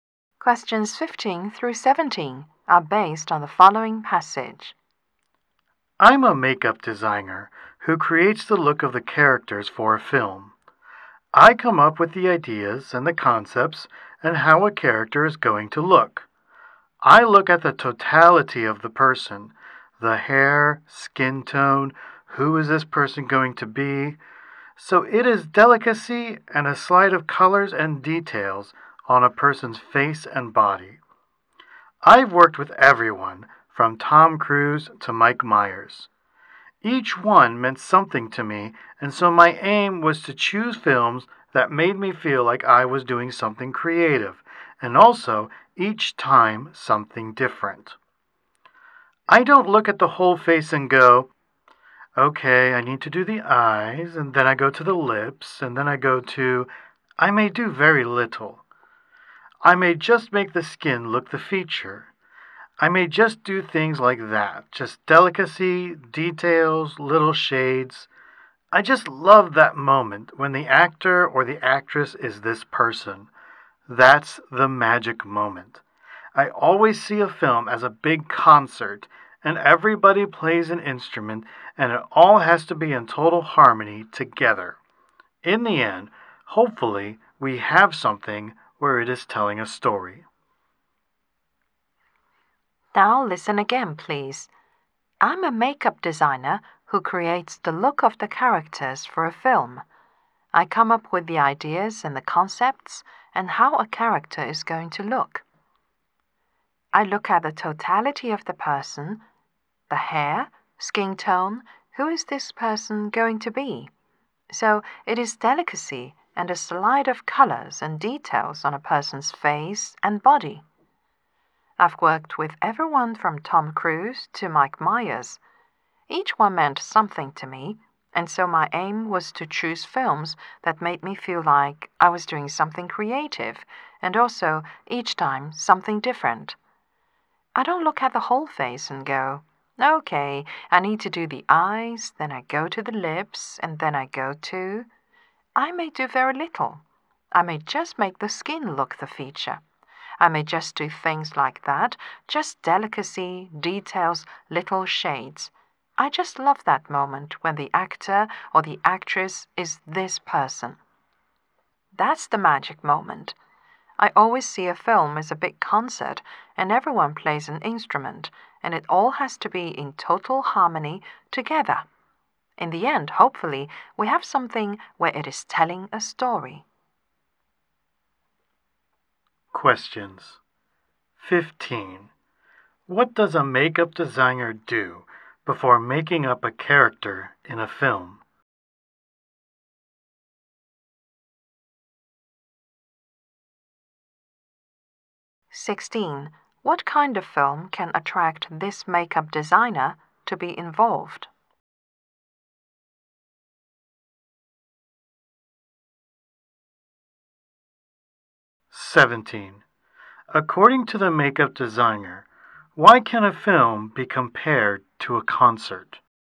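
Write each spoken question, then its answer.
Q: What does a makeup designer do before making up a character in a film?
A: Looks at the whole person and comes up with the concept of how the character will look

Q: What kind of film can attract this makeup designer to be involved?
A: Films that let her do something creative and different each time

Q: According to the makeup designer, why can a film be compared to a concert?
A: Everyone plays a part, and it all has to be in harmony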